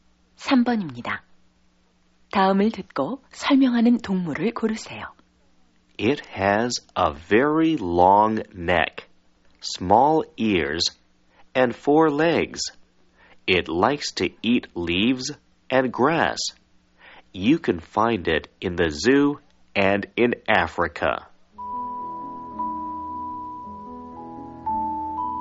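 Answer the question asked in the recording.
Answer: 기린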